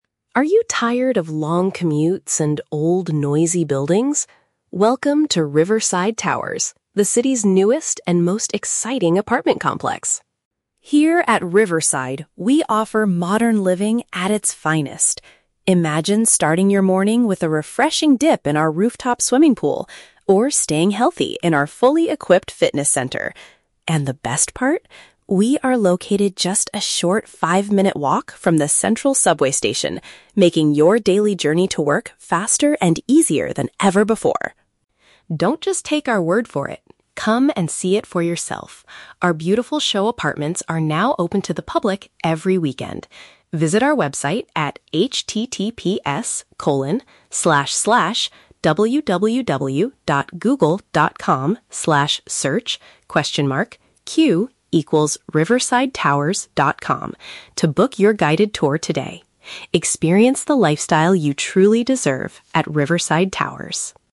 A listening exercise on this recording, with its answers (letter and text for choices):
Listen to the radio advertisement for a new apartment building. Choose the correct answer (A, B, or C) for each question.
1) What is the main advantage of the building's location?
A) It is situated very close to a public transportation hub.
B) It is built right next to a peaceful and quiet river.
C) It is located far away from the busy city center.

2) What facilities are available for the residents to use?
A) A large public park and a professional tennis court.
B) An exercise area and a place to swim on the top floor.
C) A rooftop restaurant and a modern shopping mall.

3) What does the speaker invite the listeners to do?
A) To go to the website and buy a new apartment online.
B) To call the sales office quickly to receive a special discount.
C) To come and look at a sample home during the weekend.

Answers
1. A) It is situated very close to a public transportation hub.
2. B) An exercise area and a place to swim on the top floor.
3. C) To come and look at a sample home during the weekend.

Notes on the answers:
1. The announcer says the building is located "just a short five-minute walk from the central subway station." Option A perfectly paraphrases this: "situated very close to" (five-minute walk) a "public transportation hub" (subway station). Why the traps are wrong: Option B is a trap; the building is named "Riverside Towers," but the location advantage mentioned is the subway, not the river itself. Option C is a trap; the audio actually says it is near the central subway station, meaning it is not far from the city center.
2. The advertisement highlights a "rooftop swimming pool" and a "fully equipped fitness center." Option B uses synonyms for these: an "exercise area" (fitness center) and "a place to swim on the top floor" (rooftop swimming pool). Why the traps are wrong: Options A and C are plausible amenities for a modern apartment complex, but they are never mentioned in the audio script.
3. The announcer says, "Our beautiful show apartments are now open to the public every weekend," and invites people to "Come and see it for yourself!" "Look at a sample home" is a direct paraphrase of seeing a show apartment. Why the traps are wrong: Option A is a trap; the website is mentioned, but it is to "book your guided tour," not to buy an apartment online. Option B is a trap; there is no mention of calling a sales office or getting a discount.

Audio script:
Announcer: Are you tired of long commutes and old, noisy buildings? Welcome to Riverside Towers, the city's newest and most exciting apartment complex!
Here at Riverside, we offer modern living at its finest. Imagine starting your morning with a refreshing dip in our rooftop swimming pool, or staying healthy in our fully equipped fitness center. And the best part? We are located just a short five-minute walk from the central subway station, making your daily journey to work faster and easier than ever before.
Don't just take our word for it. Come and see it for yourself! Our beautiful show apartments are now open to the public every weekend. Visit our website at https://www.google.com/search?q=riversidetowers.com to book your guided tour today. Experience the lifestyle you truly deserve at Riverside Towers!